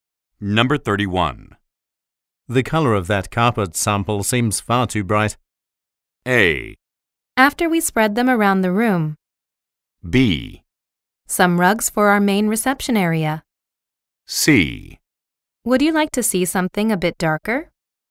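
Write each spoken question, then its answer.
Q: The color of that carpet sample seems far too bright.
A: C: Would you like to see something a bit darker?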